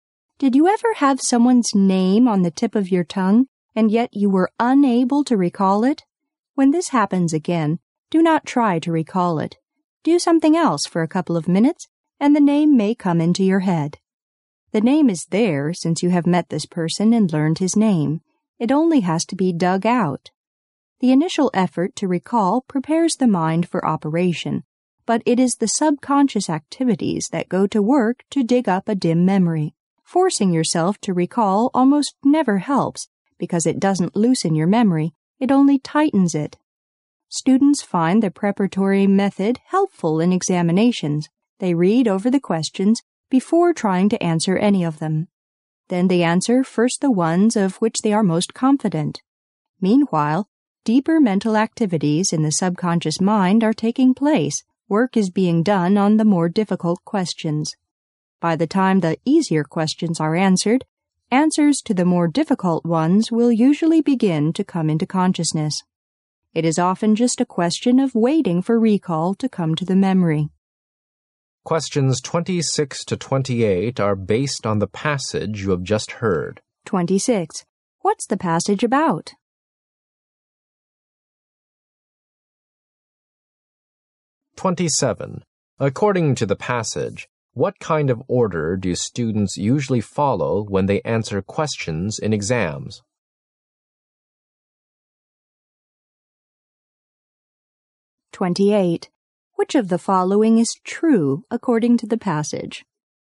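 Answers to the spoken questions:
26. How to recall things from memory
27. They answer the easiest questions, the ones they're most confident about, first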